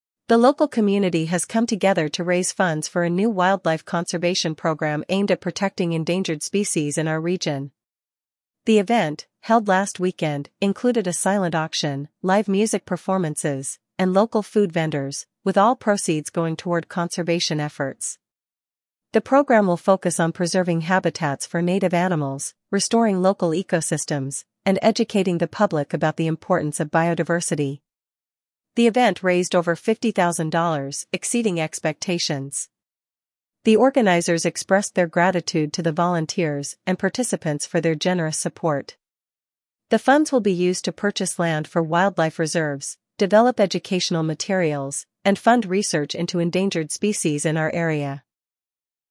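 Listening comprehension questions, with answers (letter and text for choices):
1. What is the purpose of the community event?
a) To raise funds for a new library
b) To support wildlife conservation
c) To promote local businesses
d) To provide food for the homeless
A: b) To support wildlife conservation

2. What activities were included in the event?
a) A cooking contest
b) A silent auction, live music, and food vendors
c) A marathon race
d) A sports tournament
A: b) A silent auction, live music, and food vendors

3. How much money was raised during the event?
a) $5,000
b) $10,000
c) $50,000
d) $100,000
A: c) $50,000

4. What will the raised funds be used for?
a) Supporting local farmers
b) Purchasing land for wildlife reserves and funding research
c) Building new sports facilities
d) Organizing more events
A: b) Purchasing land for wildlife reserves and funding research

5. Who expressed gratitude for the support of the event?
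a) The local government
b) The event organizers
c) The wildlife researchers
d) The participants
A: b) The event organizers

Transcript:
The local community has come together to raise funds for a new wildlife conservation program aimed at protecting endangered species in our region. The event, held last weekend, included a silent auction, live music performances, and local food vendors, with all proceeds going toward conservation efforts. The program will focus on preserving habitats for native animals, restoring local ecosystems, and educating the public about the importance of biodiversity. The event raised over $50,000, exceeding expectations. The organizers expressed their gratitude to the volunteers and participants for their generous support. The funds will be used to purchase land for wildlife reserves, develop educational materials, and fund research into endangered species in our area.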